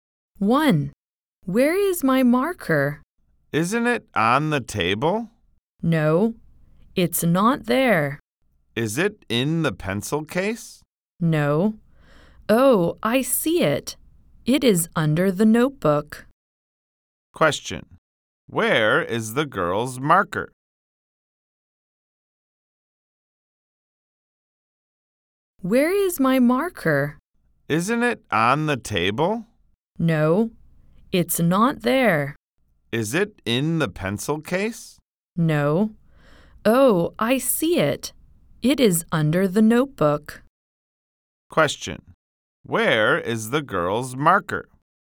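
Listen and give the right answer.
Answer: Under the notebook.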